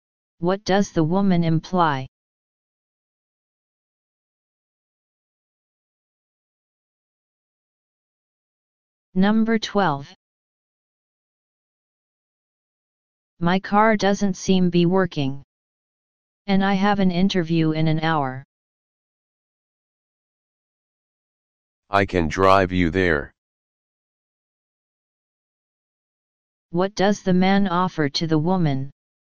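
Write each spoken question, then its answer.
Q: What does the man offer to the woman?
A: To drive her to her interview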